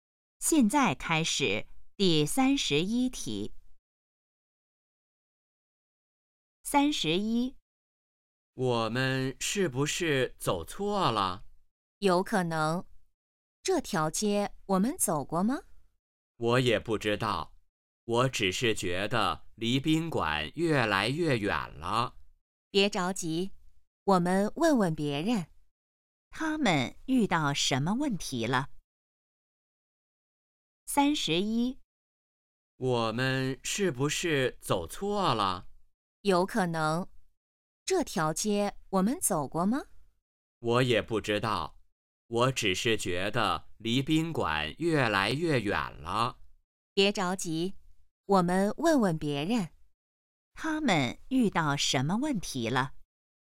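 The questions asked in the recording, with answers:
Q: 他们遇到什么问题了。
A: 走错路了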